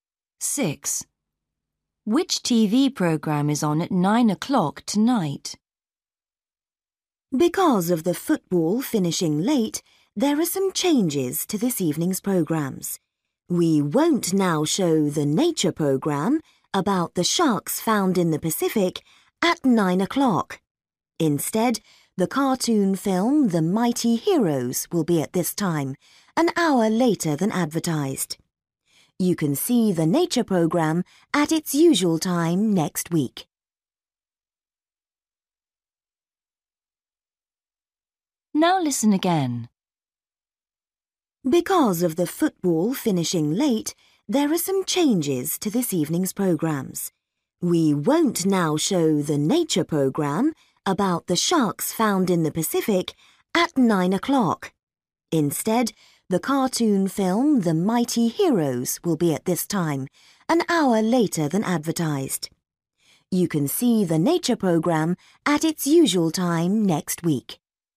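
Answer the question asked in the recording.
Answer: The cartoon film The Mighty Heroes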